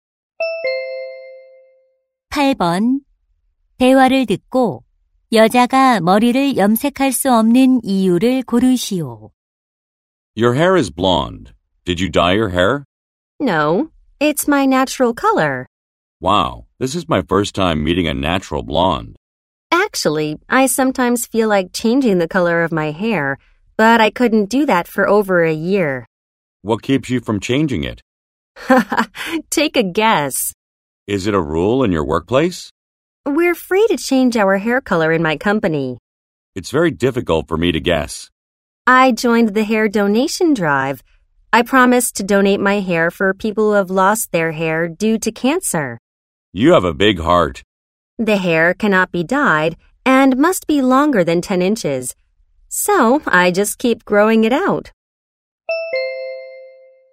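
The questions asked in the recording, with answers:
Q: 대화를 듣고 여자가 머리를 염색할 수 없는 이유를 고르시오.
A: 암 환자를 위해 머리카락을 기부하기로 해서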